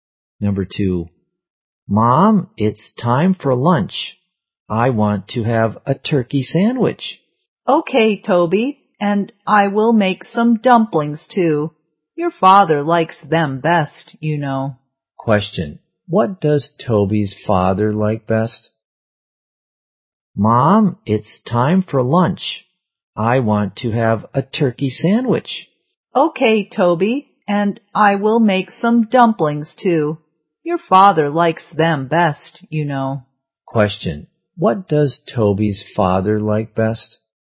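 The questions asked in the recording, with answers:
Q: Question, what does Toby's father like best?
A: Dumplings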